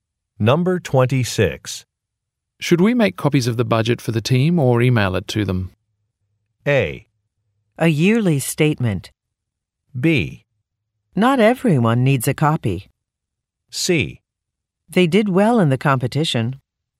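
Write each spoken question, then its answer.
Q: Should we make copies of the budget for the team or email it to them?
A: B: Not everyone needs a copy.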